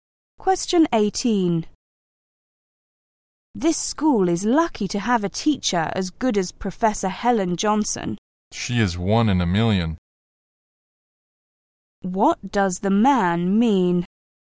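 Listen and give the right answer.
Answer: Professor Johnson is an excellent teacher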